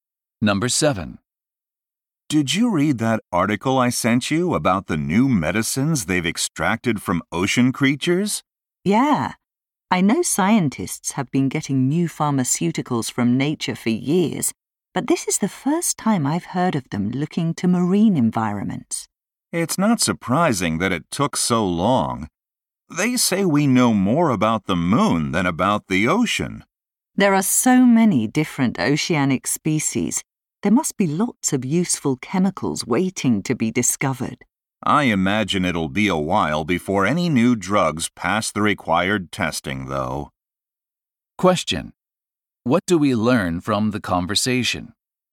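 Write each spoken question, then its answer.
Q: Question: What do we learn from the conversation?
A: Scientists have only recently started looking for new medicines in the ocean.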